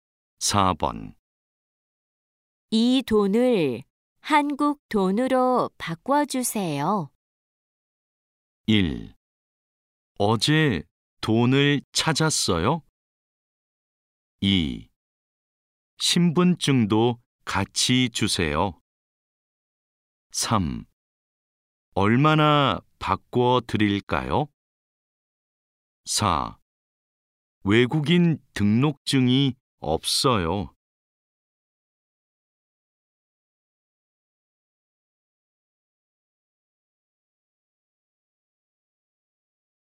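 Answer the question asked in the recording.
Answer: 3: 얼마나 바꿔드릴까요?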